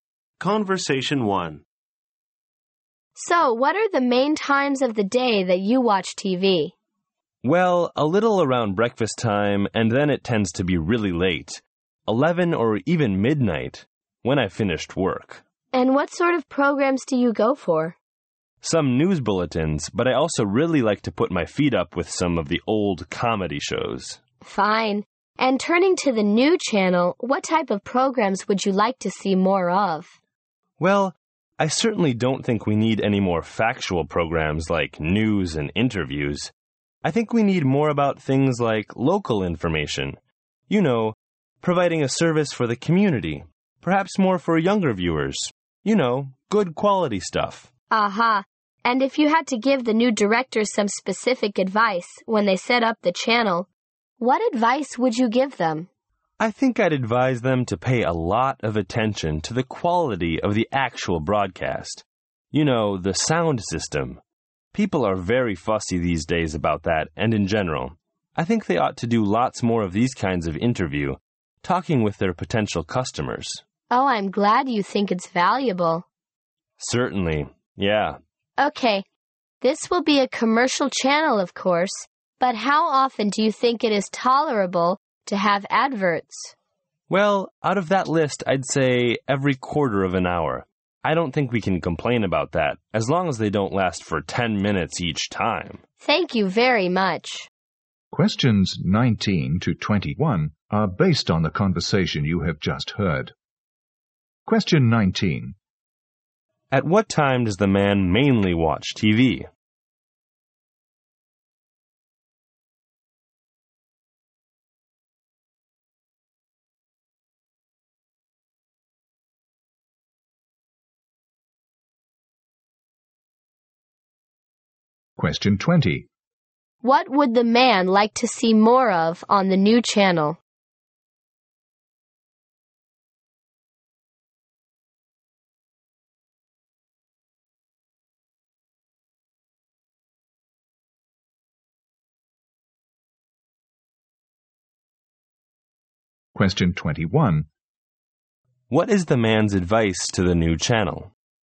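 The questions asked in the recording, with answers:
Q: At what time does the man mainly watch TV?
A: Late at night, after work

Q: What would the man like to see more of on the new channel?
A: Local information and community service programs

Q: What is the man's advice to the new channel?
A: Pay attention to broadcast quality and do more interviews with potential customers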